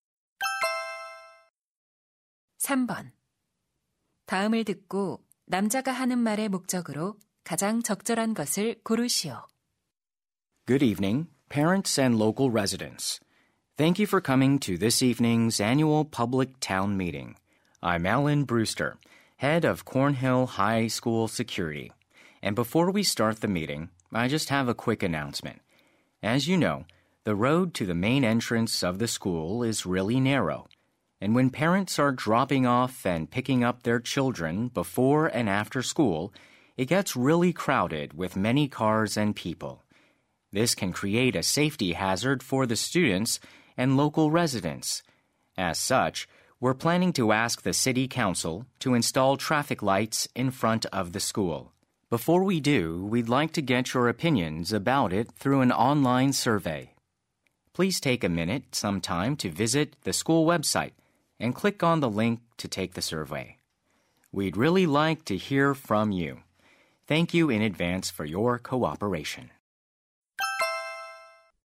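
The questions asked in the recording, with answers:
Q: 다음을 듣고 남자가 하는 말의 목적으로 가장 적절한 것을 고르시오.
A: 신호등 설치에 관한 온라인 설문 참여를 요청하려고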